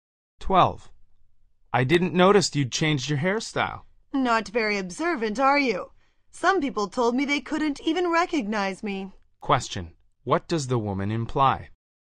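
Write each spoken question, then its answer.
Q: What does the woman imply?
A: Her new hairstyle changed her appearance a lot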